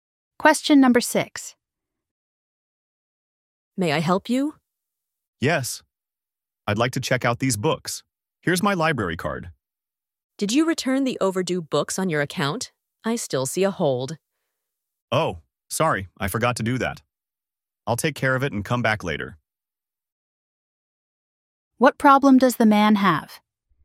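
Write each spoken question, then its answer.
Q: What problem does the man have?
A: He hasn't returned overdue books, so his account has a hold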